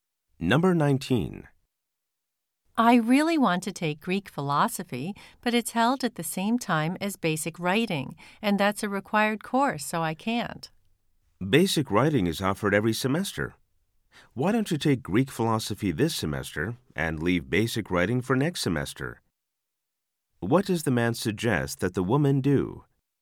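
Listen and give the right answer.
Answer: Take Greek philosophy this semester and basic writing next semester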